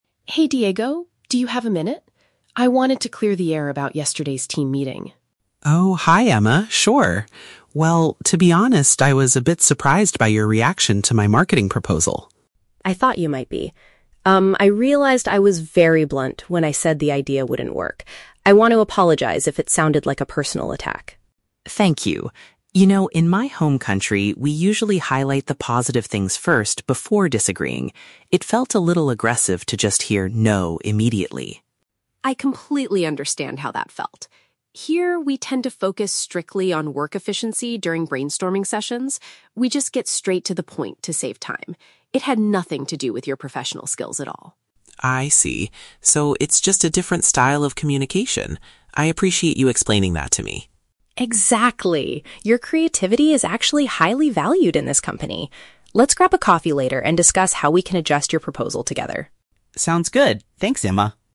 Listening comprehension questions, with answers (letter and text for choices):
Listen to the conversation between two colleagues and choose the correct answer (A, B, or C).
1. What is the main reason Emma wants to talk to Diego?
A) To apologize for rejecting his proposal too directly.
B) To complain about his lack of creativity in the meeting.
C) To invite him to a formal training session on communication.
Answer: A) To apologize for rejecting his proposal too directly.

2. How do people in Diego's home country typically express disagreement?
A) They remain completely silent until the end of the meeting.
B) They mention good points before criticizing an idea.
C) They aggressively say "no" to save time during brainstorming.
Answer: B) They mention good points before criticizing an idea.

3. Why do team members in Emma's culture speak so directly?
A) Because they want to test the new employees' professional skills.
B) Because they aim to maximize productivity and save time.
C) Because they dislike working on marketing projects.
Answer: B) Because they aim to maximize productivity and save time.

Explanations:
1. Emma wants to "clear the air" and apologizes because she was "very blunt" (rejected too directly) and didn't want it to sound like a "personal attack". Why the trap is wrong: Option (B) is a trap. The word "creativity" is used in the audio, but Emma says his creativity is "highly valued," not lacking. Option (C) is a plausible workplace scenario, but it is never mentioned in the conversation.
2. Diego explains that in his country, they "highlight the positive things first before disagreeing." Option B paraphrases this exactly as mentioning "good points before criticizing an idea." Why the trap is wrong: Option (A) is a logical assumption about indirect cultures, but it is not stated in the audio. Option (C) is a trap because saying "no" to save time is what Emma's culture does, not Diego's.
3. Emma explains that her culture focuses "strictly on work efficiency" (maximize productivity) and gets straight to the point to "save time." Why the trap is wrong: Option (A) is a trap. Emma mentions "professional skills," but she explicitly says her directness "had nothing to do with" his skills. Option (C) is a trap; the "marketing proposal" is the topic of the project, but there is no mention of disliking marketing.

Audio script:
Emma: Hey Diego, do you have a minute? I wanted to clear the air about yesterday's team meeting.
Diego: Oh, hi Emma. Sure. Well, to be honest, I was a bit surprised by your reaction to my marketing proposal.
Emma: I thought you might be. Um, I realized I was very blunt when I said the idea wouldn't work. I want to apologize if it sounded like a personal attack.
Diego: Thank you. You know, in my home country, we usually highlight the positive things first before disagreeing. It felt a little aggressive to just hear 'no' immediately.
Emma: I completely understand how that felt. Here, we tend to focus strictly on work efficiency during brainstorming sessions. We just get straight to the point to save time. It had nothing to do with your professional skills at all.
Diego: I see. So it's just a different style of communication. I appreciate you explaining that to me.
Emma: Exactly! Your creativity is actually highly valued in this company. Let's grab a coffee later and discuss how we can adjust your proposal together.
Diego: Sounds good. Thanks, Emma.